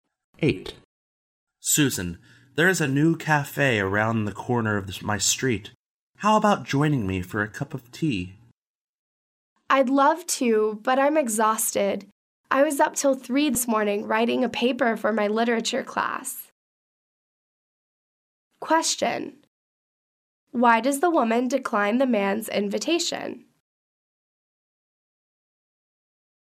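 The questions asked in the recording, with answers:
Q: Why does the woman decline the man's invitation?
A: She is exhausted after staying up until 3 writing a paper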